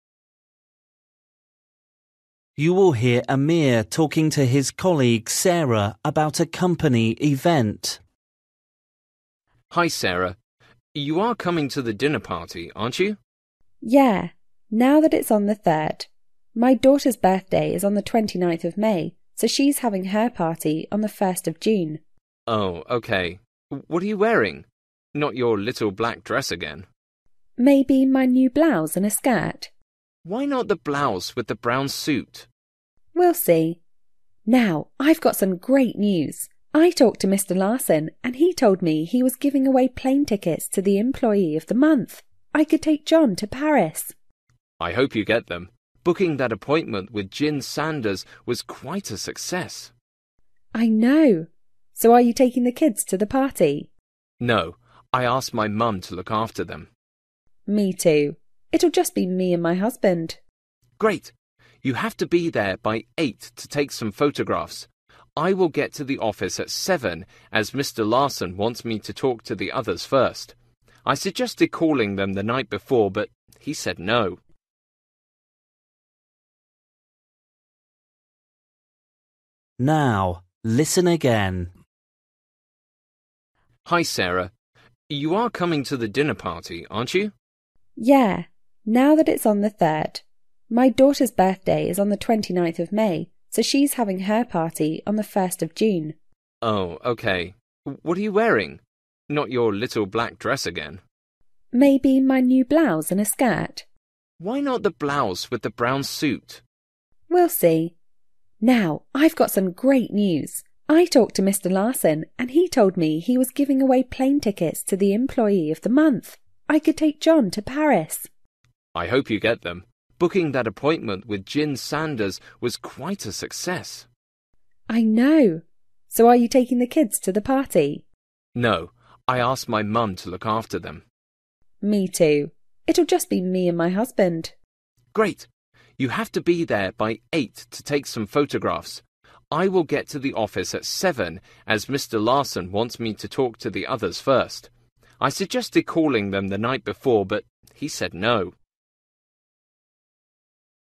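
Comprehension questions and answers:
For each question, choose the correct answer.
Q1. When is the event?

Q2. What does Amir think Sarah should wear at the event?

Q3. What is Sarah excited about?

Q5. Why does Amir have to be at the event earlier?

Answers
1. On the 3rd (of June)
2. The blouse with the brown suit
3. Possibly winning plane tickets to Paris
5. Mr. Larson wants him to talk to the others first

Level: Luyện nghe trình độ A2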